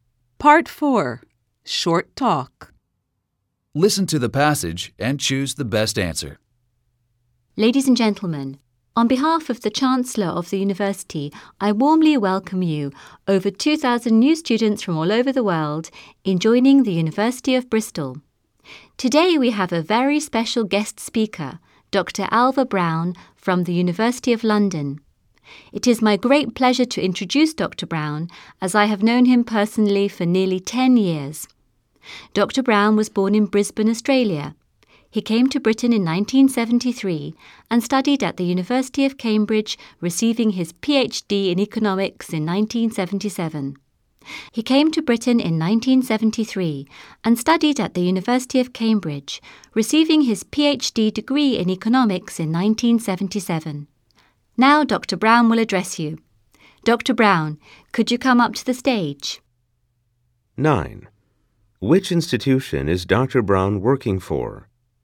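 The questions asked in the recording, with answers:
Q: Which institution is Dr. Brown working for?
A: The University of London

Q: When was Dr. Brown awarded his degree?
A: In 1977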